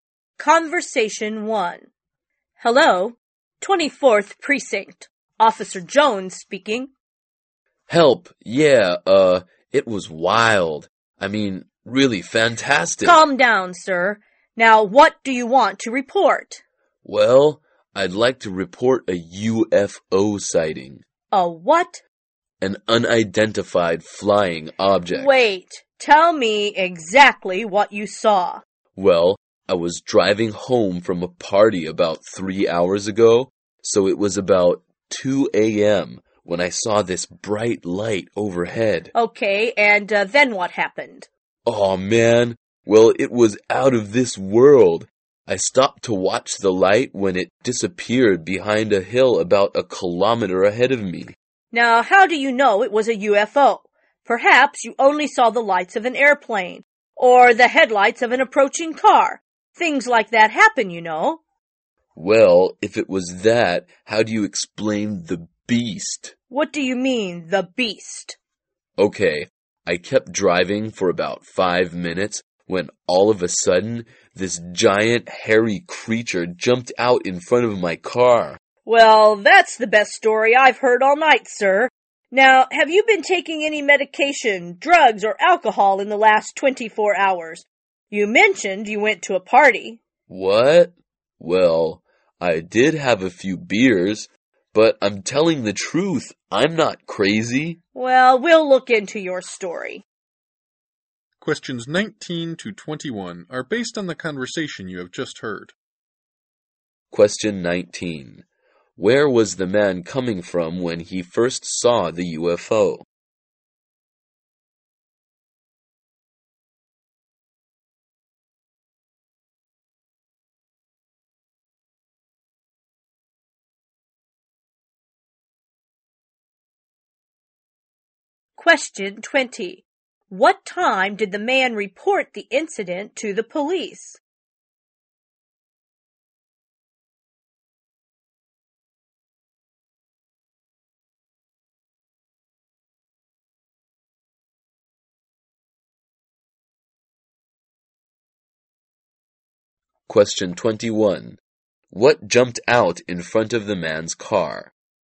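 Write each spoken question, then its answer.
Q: Where was the man coming from when he first saw the UFO?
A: A party

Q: What time did the man report the incident to the police?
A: About 5 a.m.

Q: What jumped out in front of the man's car?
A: A giant hairy creature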